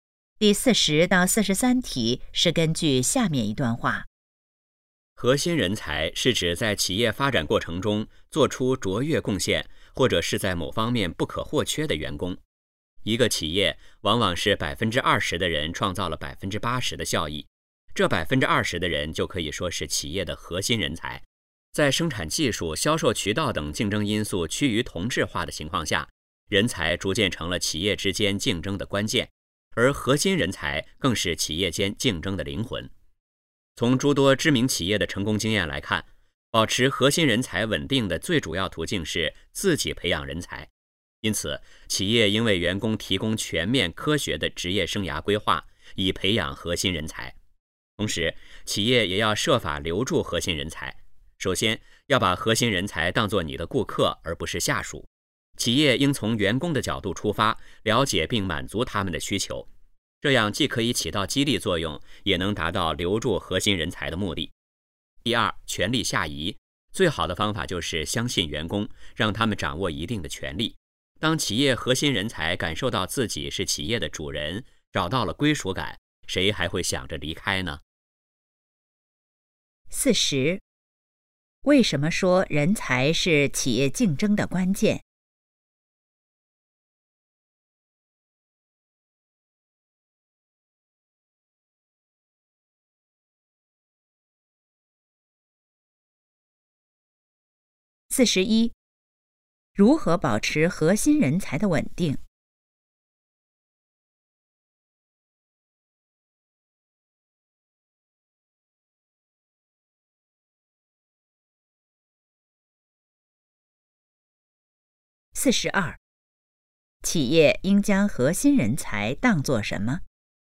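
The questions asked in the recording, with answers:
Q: 为什么说人才是企业竞争的关键?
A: 生产技术、销售渠道等竞争因素趋于同质化

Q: 如何保持核心人才的稳定?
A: 企业自己培养人才

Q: 企业应将核心人才当作什么?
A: 顾客

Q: 权力下移会让员工感觉怎么样?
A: 自己是企业的主人,有归属感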